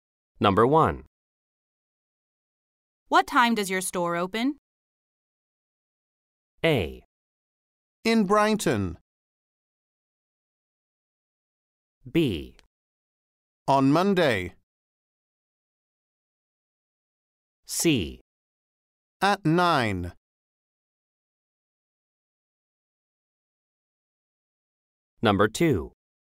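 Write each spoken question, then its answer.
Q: What time does your store open?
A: C: At 9.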